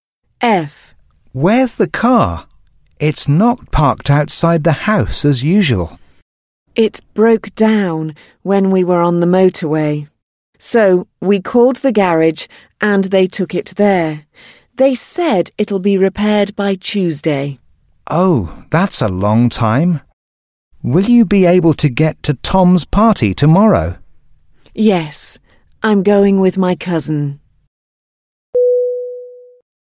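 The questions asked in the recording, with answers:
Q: Where's the car? It's not parked outside the house as usual.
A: At the garage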